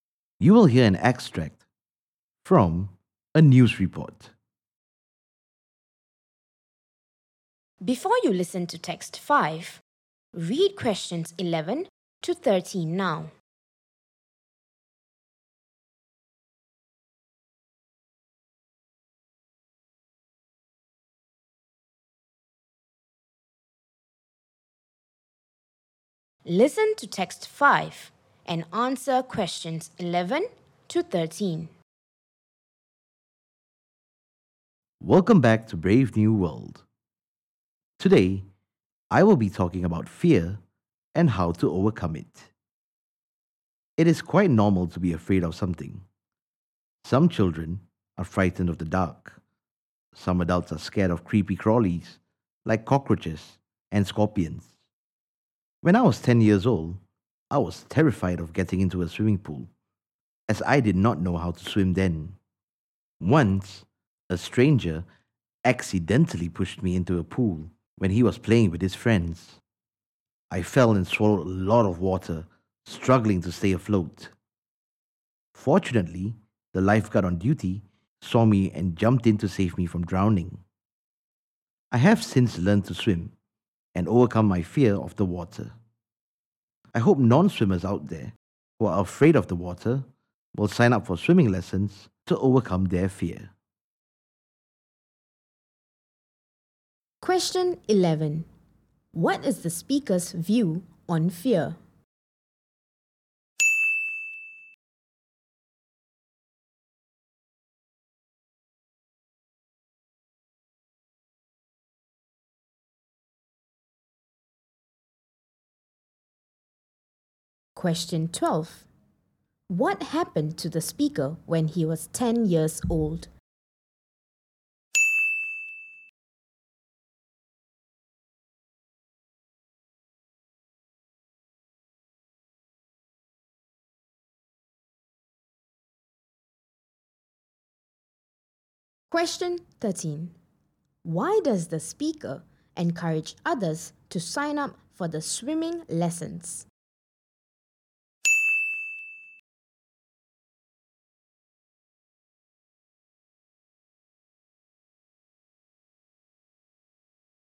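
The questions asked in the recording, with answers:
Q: What is the speaker's view on fear?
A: It is quite normal to be afraid of something.

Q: What happened to the speaker when he was 10 years old?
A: A stranger accidentally pushed him into a pool and he nearly drowned until a lifeguard saved him.

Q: Why does the speaker encourage others to sign up for the swimming lessons?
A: To overcome their fear of the water.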